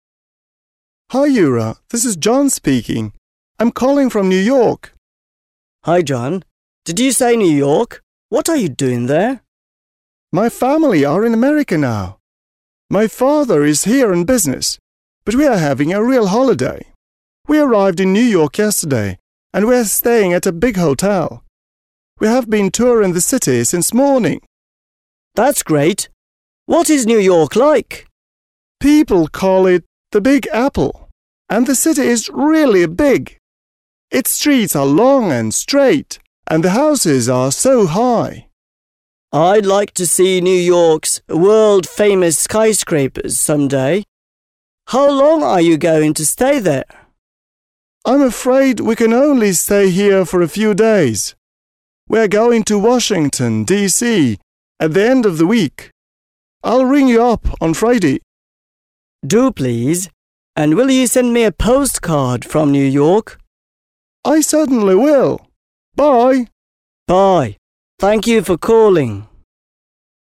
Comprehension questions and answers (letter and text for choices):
Listen to the dialogues and complete the sentences.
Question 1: John went to the USA with ...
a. Yura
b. his family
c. his friends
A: b. his family

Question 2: People call1 New York ...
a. the Big Apple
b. the Little Apple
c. the Apple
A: a. the Big Apple

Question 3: Yura would like to see New York's ...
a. streets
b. bridges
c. skyscrapers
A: c. skyscrapers

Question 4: John's going to Washington DC ...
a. at the weekend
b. on Friday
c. on Monday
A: a. at the weekend

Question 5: John is going to send Yura a ...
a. letter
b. telegram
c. postcard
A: c. postcard

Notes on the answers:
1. В тексте Джон говорит: «My family are in America now» (Моя семья сейчас в Америке) и «We arrived...» (Мы прибыли...). Это указывает на правильный ответ his family (b).
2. Джон упоминает фразу: «People call it the Big Apple» (Люди называют его Большим яблоком). Правильный ответ — the Big Apple (a).
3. Юра говорит: «I'd like to see New York's world famous skyscrapers someday» (Я бы хотел когда-нибудь увидеть всемирно известные небоскребы Нью-Йорка). Правильный ответ — skyscrapers (c).
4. Джон говорит: «We are going to Washington DC at the end of the week» (Мы едем в Вашингтон в конце недели). Выражение at the end of the week синонимично понятию «выходные». Правильный ответ — at the weekend (a).
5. Юра просит: «And will you send me a postcard from New York?» (А ты пришлешь мне открытку из Нью-Йорка?), на что Джон отвечает согласием. Правильный ответ — postcard (c).

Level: 7 класс